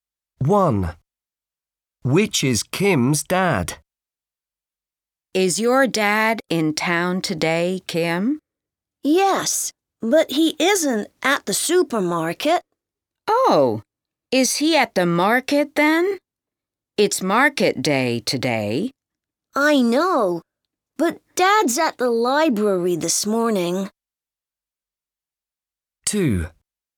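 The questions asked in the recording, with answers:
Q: Which is Kim's dad?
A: At the library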